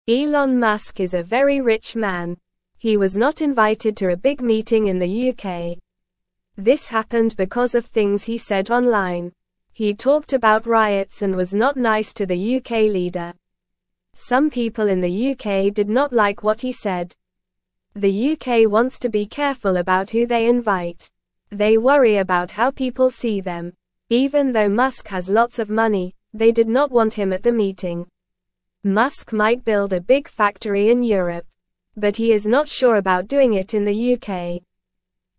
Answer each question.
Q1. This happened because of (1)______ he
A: things

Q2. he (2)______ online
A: said

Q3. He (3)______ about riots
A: talked

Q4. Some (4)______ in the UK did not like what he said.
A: people

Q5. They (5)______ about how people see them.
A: worry

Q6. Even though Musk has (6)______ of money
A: lots

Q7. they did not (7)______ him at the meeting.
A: want

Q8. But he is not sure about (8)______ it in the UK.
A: doing

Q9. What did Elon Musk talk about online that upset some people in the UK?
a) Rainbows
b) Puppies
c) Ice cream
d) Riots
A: d) Riots

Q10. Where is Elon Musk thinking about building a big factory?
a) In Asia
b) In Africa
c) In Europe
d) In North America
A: c) In Europe

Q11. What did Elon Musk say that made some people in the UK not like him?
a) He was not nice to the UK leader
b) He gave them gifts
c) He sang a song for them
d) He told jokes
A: a) He was not nice to the UK leader

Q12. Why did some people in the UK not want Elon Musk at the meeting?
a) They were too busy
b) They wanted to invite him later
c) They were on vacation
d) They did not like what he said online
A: d) They did not like what he said online

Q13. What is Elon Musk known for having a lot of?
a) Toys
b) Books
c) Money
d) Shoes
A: c) Money

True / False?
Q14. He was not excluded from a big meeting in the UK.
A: False

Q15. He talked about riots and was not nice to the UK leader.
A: True

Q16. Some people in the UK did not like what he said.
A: True

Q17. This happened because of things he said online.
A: True

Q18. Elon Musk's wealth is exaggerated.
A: False

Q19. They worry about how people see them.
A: True

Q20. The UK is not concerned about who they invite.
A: False

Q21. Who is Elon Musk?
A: Elon Musk is a very rich man.

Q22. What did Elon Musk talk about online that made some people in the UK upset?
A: He talked about riots and was not nice to the UK leader.

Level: Level 1

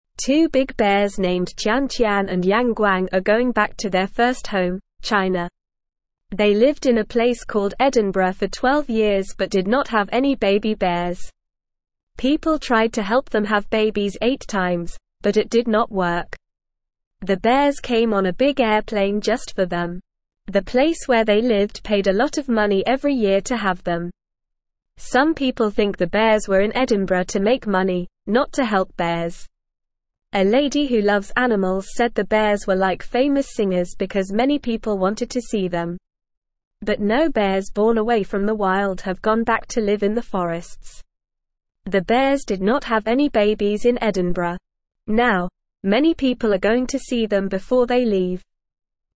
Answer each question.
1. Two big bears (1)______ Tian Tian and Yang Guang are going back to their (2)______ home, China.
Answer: named

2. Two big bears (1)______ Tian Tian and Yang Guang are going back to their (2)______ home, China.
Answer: first

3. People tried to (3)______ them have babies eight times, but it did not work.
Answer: help

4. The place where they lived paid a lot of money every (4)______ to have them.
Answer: year

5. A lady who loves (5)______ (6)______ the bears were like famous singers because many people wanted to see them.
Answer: animals

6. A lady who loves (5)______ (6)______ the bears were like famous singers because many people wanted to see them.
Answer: said

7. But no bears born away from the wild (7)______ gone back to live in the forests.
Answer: have

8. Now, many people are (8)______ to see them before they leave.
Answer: going

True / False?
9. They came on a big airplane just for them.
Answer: True

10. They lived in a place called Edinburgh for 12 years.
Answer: True

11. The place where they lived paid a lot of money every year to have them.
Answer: True

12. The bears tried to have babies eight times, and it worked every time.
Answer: False

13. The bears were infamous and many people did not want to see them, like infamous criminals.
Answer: False

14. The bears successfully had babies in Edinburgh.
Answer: False

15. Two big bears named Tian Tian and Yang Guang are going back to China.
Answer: True

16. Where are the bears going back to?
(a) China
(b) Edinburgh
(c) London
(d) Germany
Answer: (a) China

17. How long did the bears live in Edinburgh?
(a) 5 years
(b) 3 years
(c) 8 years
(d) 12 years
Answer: (d) 12 years

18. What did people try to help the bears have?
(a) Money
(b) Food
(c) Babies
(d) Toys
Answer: (c) Babies

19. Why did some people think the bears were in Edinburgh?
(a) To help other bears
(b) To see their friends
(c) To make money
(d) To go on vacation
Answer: (c) To make money

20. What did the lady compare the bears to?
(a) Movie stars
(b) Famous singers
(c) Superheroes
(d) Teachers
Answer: (b) Famous singers

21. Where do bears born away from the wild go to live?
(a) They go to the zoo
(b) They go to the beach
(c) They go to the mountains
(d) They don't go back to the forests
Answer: (d) They don't go back to the forests

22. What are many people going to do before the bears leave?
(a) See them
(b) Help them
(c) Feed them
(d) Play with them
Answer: (a) See them

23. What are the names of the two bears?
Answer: The names of the two bears are Tian Tian and Yang Guang.

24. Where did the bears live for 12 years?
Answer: The bears lived in Edinburgh for 12 years.

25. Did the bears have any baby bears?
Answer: No, the bears did not have any baby bears.

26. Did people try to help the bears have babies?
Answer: Yes, people tried to help the bears have babies eight times.

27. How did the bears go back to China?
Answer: The bears went back to China on a big airplane.

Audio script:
Two big bears named Tian Tian and Yang Guang are going back to their first home, China. They lived in a place called Edinburgh for 12 years but did not have any baby bears. People tried to help them have babies eight times, but it did not work. The bears came on a big airplane just for them.
Some people think the bears were in Edinburgh to make money, not to help bears. A lady who loves animals said the bears were like famous singers because many people wanted to see them. But no bears born away from the wild have gone back to live in the forests. The bears did not have any babies in Edinburgh. Now, many people are going to see them before they leave.

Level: Level 1

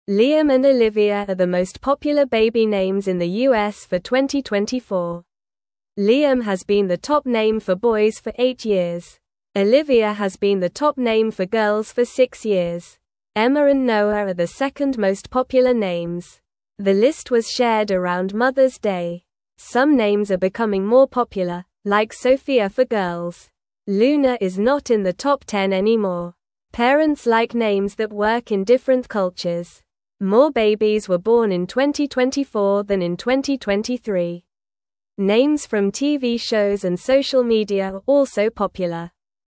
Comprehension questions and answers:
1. Liam and (1)______ are the most popular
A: Olivia

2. are the most popular (2)______ names in the U.S. for 2024.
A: baby

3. Olivia has been the top (3)______ for girls for six years.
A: name

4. The list was (4)______ around Mother's Day.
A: shared

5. Some names are becoming more popular, (5)______ Sofia for girls.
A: like

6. (6)______ like names that work in different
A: Parents

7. like names that work in different (7)______.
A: cultures

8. Names from TV shows and social (8)______ are also popular.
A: media

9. What is the top boy name in the U.S. for 2024?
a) Noah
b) Emma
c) Liam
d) Sofia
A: c) Liam

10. What is the top girl name in the U.S. for 2024?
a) Luna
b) Emma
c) Sofia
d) Olivia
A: d) Olivia

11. What is the second most popular boy name?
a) Noah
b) Liam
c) Emma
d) Luna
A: a) Noah

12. What is the second most popular girl name?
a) Olivia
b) Emma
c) Sofia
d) Luna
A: b) Emma

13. What name is becoming more popular for girls?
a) Olivia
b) Sofia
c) Emma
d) Liam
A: b) Sofia

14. How many babies were born in 2024 compared to 2023?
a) Fewer babies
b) The same number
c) No babies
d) More babies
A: d) More babies

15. What are the two most popular baby names in the U.S. for 2024?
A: Liam and Olivia.

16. Which name has been the top name for girls for six years?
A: Olivia.

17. What is the second most popular name for girls?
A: Emma.

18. What name is not in the top 10 anymore?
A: Luna.

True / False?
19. Liam is the most popular name for boys in 2024.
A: True

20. Olivia hasn't been the top girl name for six years.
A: False

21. Some names are getting less popular, like Sofia.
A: False

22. More babies were born in 2024 than in 2023.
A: True

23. Emma and Noah are the second most popular names.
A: True

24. Liam has not been the top boy name for eight years.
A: False

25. Olivia is the most popular name for girls in 2024.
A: True

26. Luna is in the top 10 names anymore.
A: False

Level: Level 1

